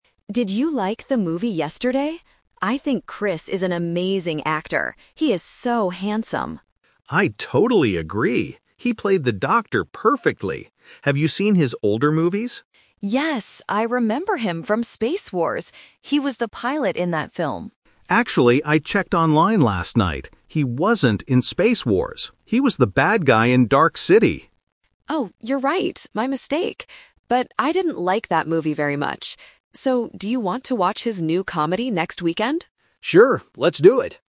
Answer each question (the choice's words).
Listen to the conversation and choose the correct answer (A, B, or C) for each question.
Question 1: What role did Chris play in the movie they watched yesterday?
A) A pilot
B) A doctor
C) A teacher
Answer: A doctor

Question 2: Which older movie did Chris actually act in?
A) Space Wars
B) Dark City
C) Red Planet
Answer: Dark City

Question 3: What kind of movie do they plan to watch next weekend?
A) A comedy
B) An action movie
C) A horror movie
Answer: A comedy

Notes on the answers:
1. David says, "He played the doctor perfectly." Option A (a pilot) is the trap because it was mentioned as a role in an older movie. Option C is not mentioned.
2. Emma thinks Chris was in Space Wars (Option A is the trap), but David corrects her by saying, "He wasn't in Space Wars. He was the bad guy in Dark City." Option C is not mentioned.
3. At the end of the conversation, Emma asks, "do you want to watch his new comedy next weekend?" and David agrees. Options B and C are not mentioned.

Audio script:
Emma: Did you like the movie yesterday? I think Chris is an amazing actor. He is so handsome!
David: I totally agree. He played the doctor perfectly. Have you seen his older movies?
Emma: Yes! I remember him from Space Wars. He was the pilot in that film.
David: Actually, I checked online last night. He wasn't in Space Wars. He was the bad guy in Dark City.
Emma: Oh, you're right! My mistake. But I didn't like that movie very much.